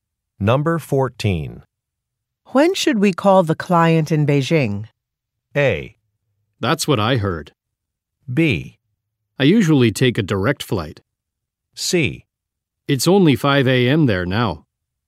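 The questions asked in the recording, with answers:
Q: When should we call the client in Beijing?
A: C: It's only 5 a.m. there now.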